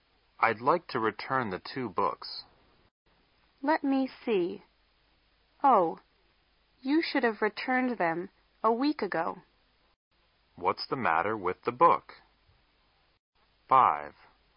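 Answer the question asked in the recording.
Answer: They are a week overdue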